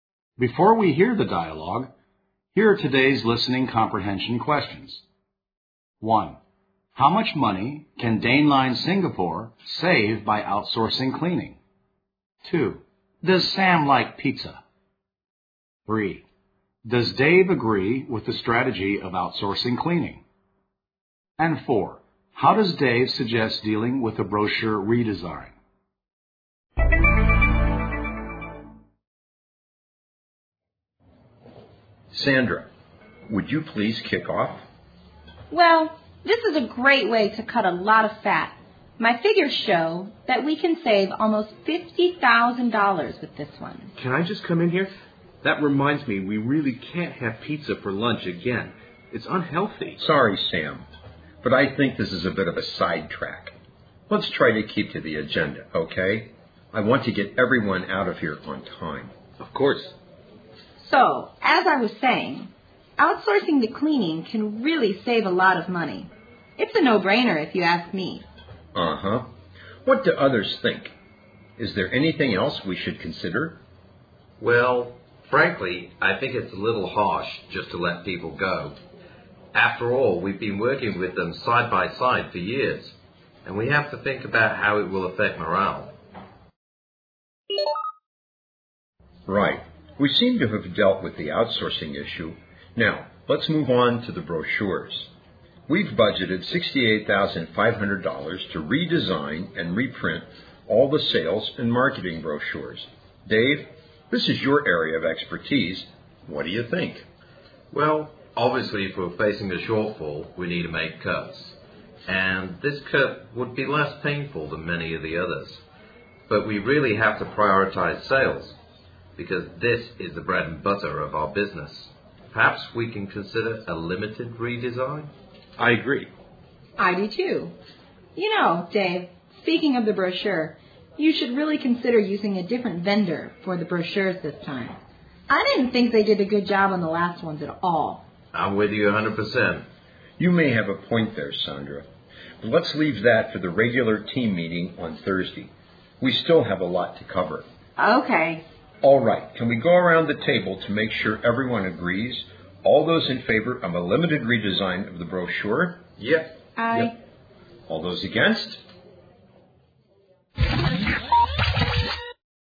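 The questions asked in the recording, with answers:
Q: How much money can Dane Line Singapore save by outsourcing cleaning?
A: Almost $50,000

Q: How does Dave suggest dealing with a brochure redesign?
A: A limited redesign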